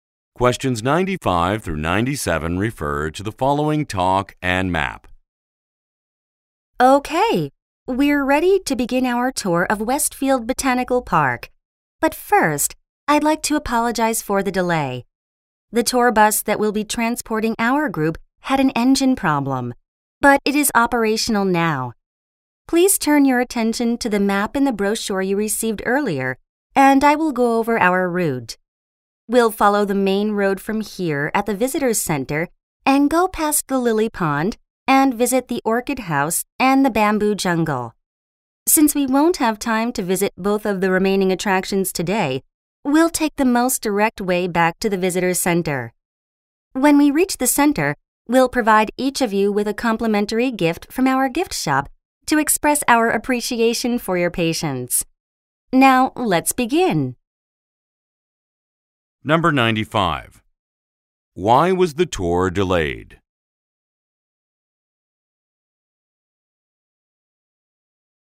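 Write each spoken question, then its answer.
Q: Why was the tour delayed?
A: The tour bus had an engine problem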